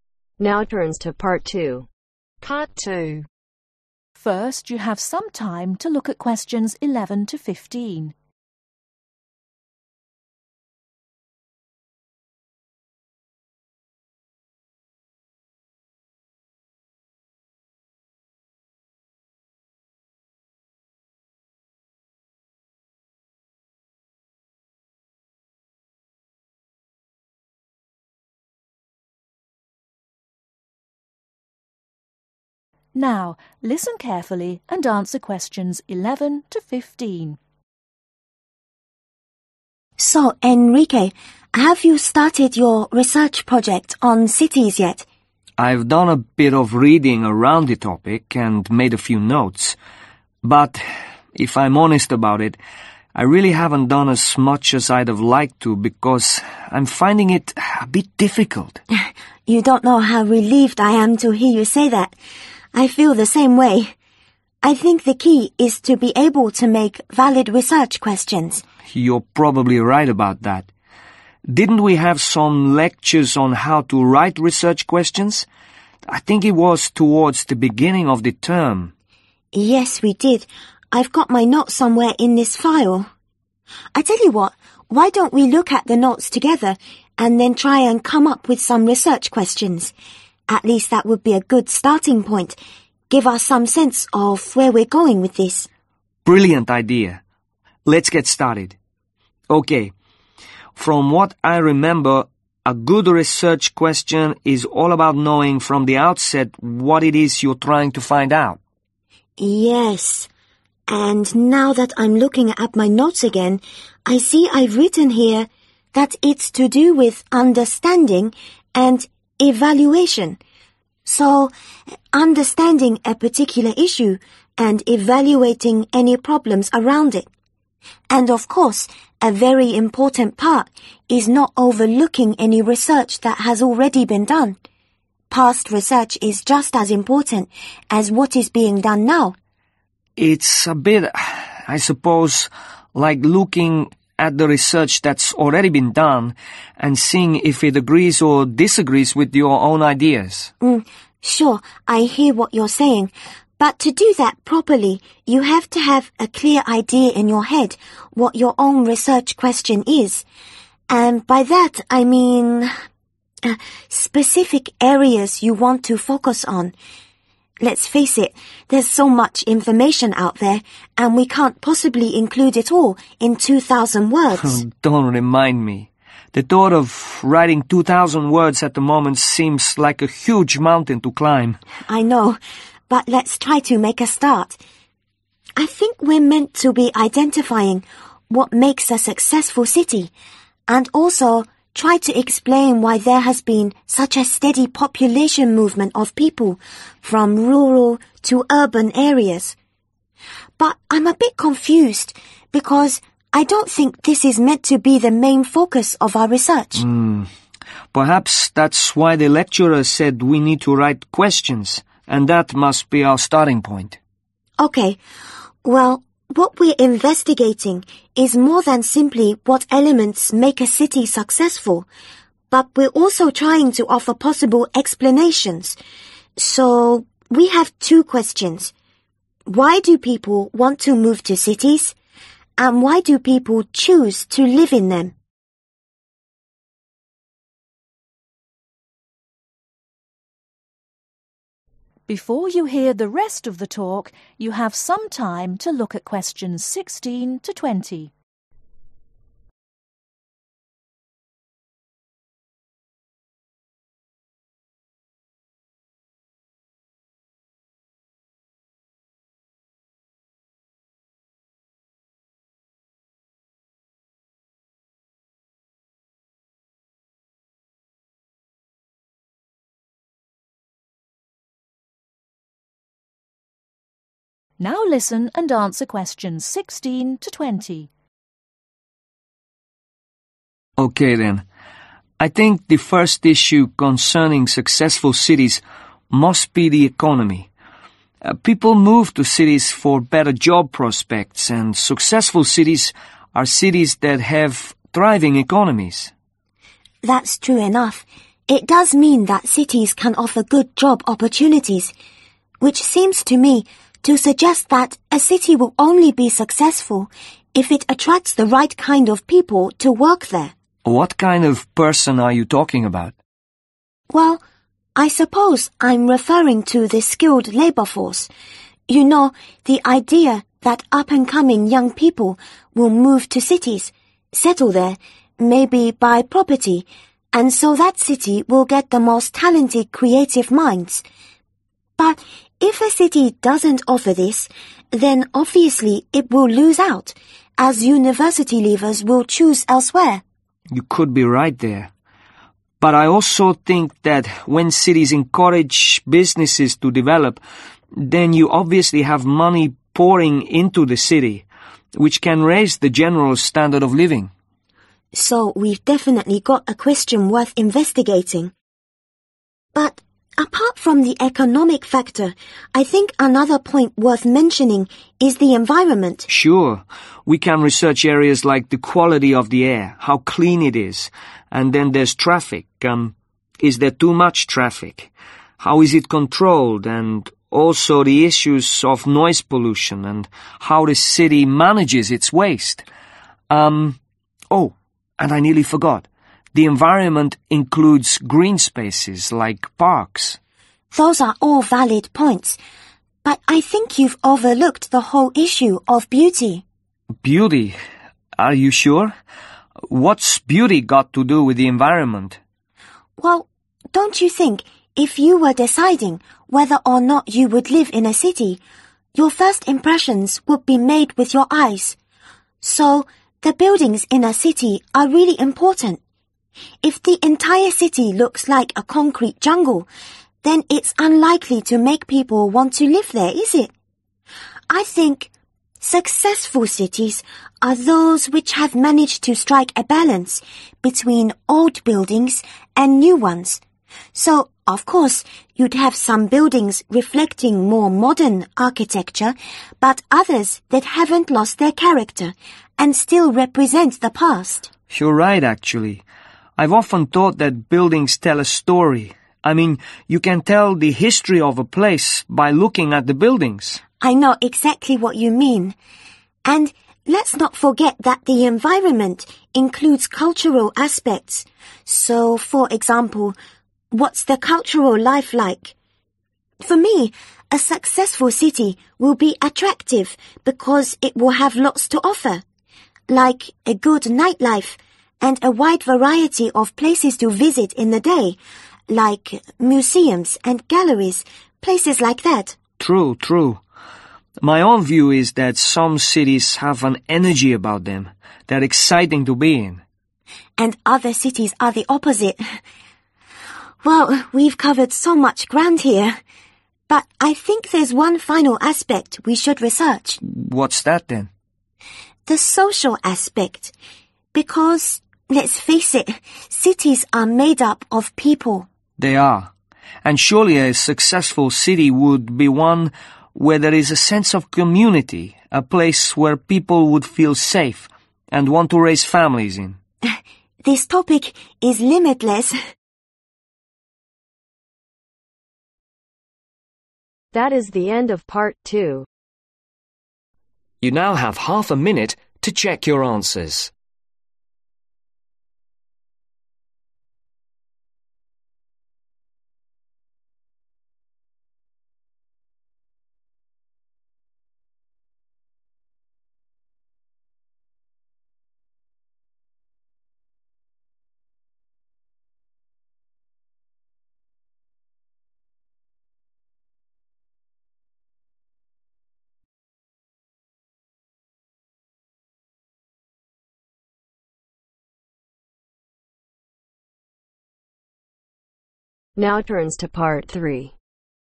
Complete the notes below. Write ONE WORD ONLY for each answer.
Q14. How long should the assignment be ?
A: 2000 Words

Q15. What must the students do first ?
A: Write Questions

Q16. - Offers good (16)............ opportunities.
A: Job

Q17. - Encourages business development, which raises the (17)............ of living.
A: Standard

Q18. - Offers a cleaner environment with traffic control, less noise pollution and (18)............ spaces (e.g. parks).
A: Green

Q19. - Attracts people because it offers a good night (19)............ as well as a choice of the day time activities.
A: Life

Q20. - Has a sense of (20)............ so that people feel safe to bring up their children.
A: Community